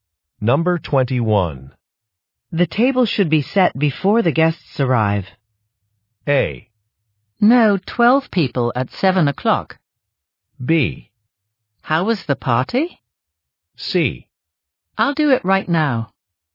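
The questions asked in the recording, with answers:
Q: The table should be set before the guests arrive.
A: C: I'll do it right now.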